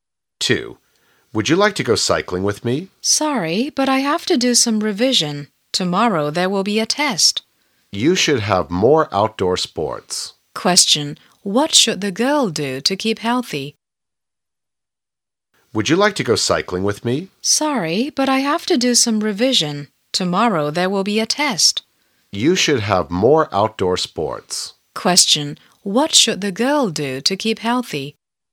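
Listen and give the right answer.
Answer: Have more outdoor sports.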